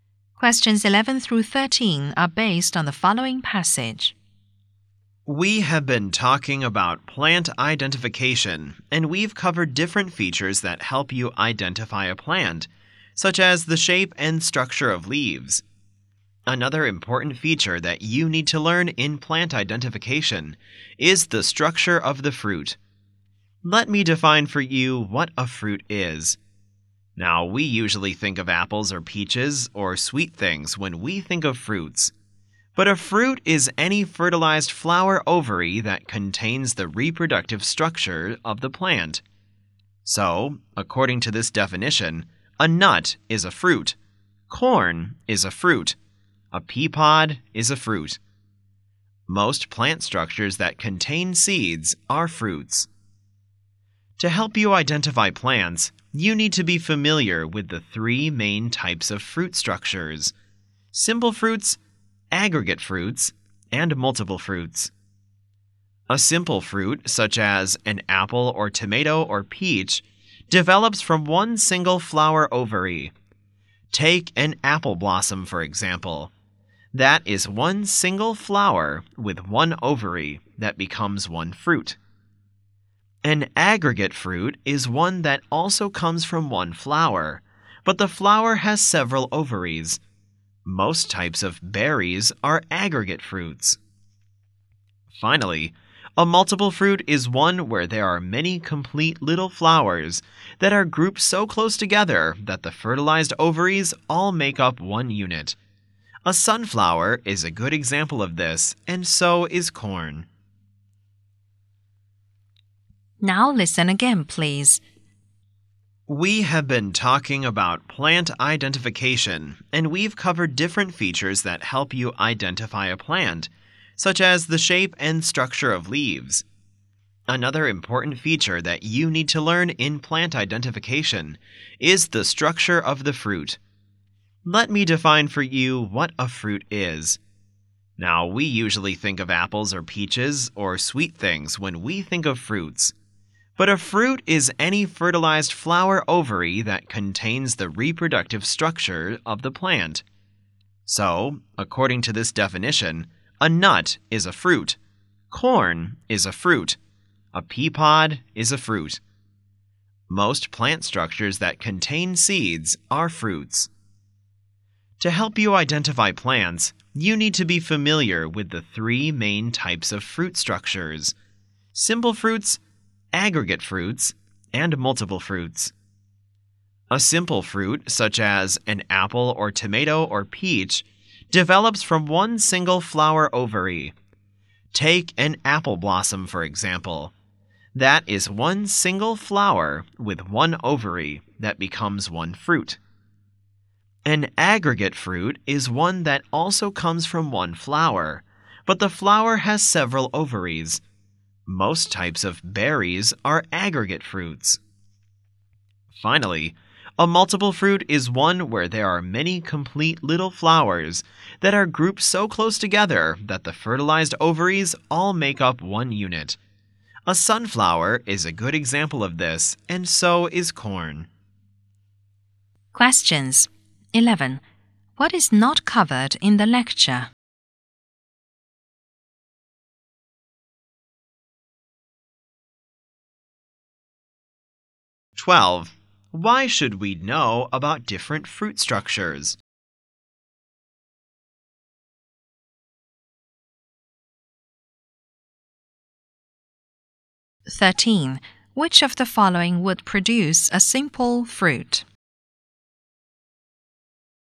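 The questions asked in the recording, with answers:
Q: Why should we know about different fruit structures?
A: To help identify plants

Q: Which of the following would produce a simple fruit?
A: An apple blossom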